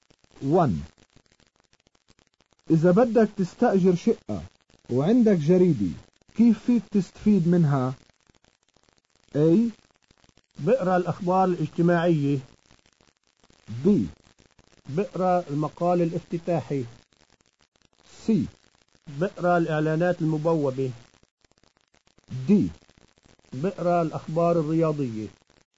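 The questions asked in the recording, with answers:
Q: إذا بدك تستأجر شقة وعندك جريدة كيف فيك تستفيد منها؟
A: C: بقرأ الإعلانات المبوبة.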